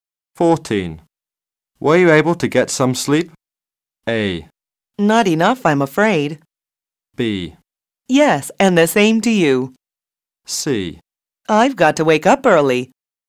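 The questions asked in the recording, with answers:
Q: Were you able to get some sleep?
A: A: Not enough, I'm afraid.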